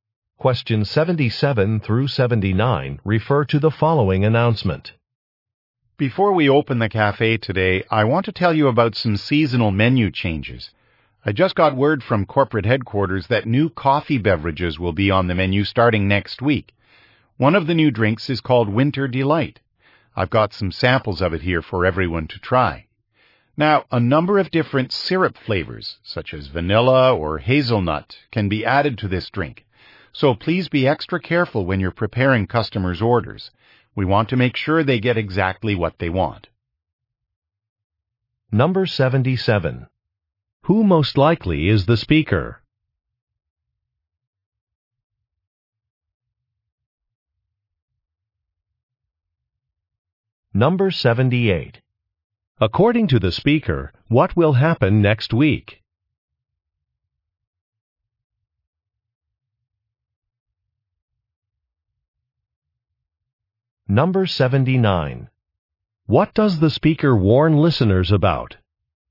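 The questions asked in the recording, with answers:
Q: According to the speaker, what will happen next week?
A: New coffee drinks will be added to the menu

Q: What does the speaker warn listeners about?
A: Being careful with orders because different syrup flavors can be added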